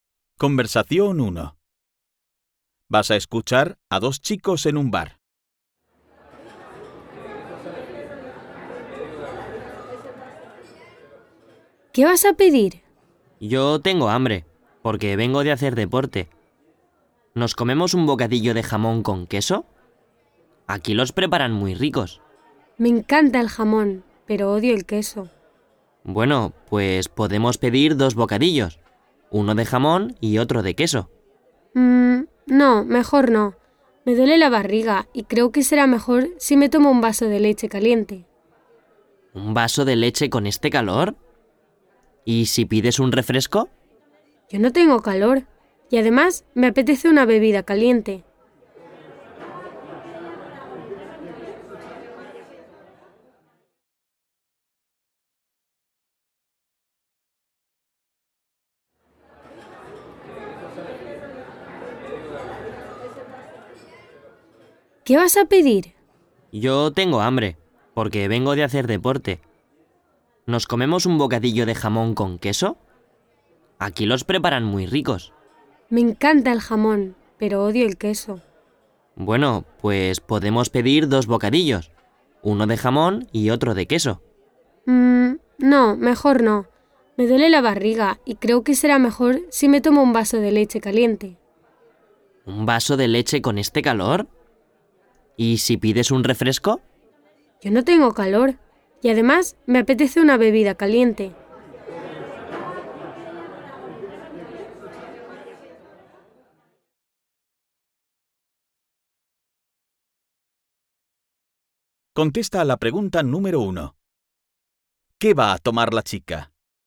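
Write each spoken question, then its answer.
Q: ¿Qué va a tomar la chica?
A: Un vaso de leche caliente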